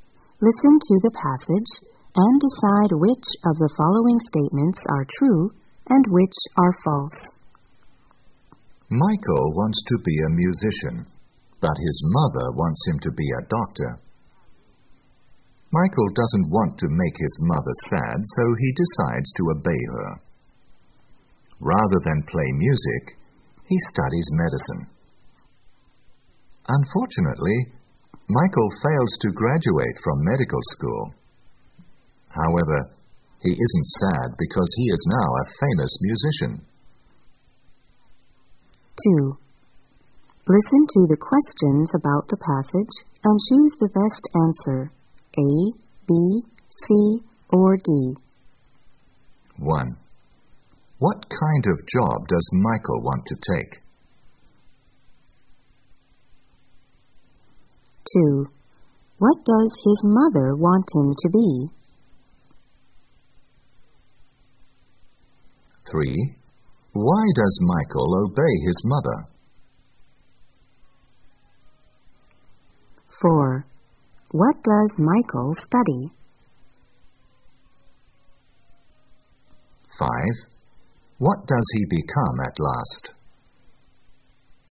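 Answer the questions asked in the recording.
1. A musician
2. A doctor
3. He doesn't want to make his mother sad
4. Medicine
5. A famous musician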